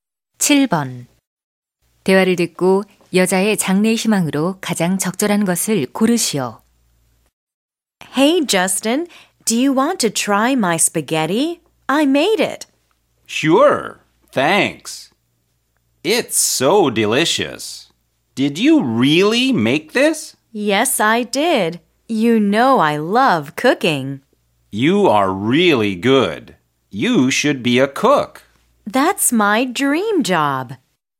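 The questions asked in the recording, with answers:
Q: 대화를 듣고 여자의 장래 희망으로 가장 적절한 것을 고르시오.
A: 요리사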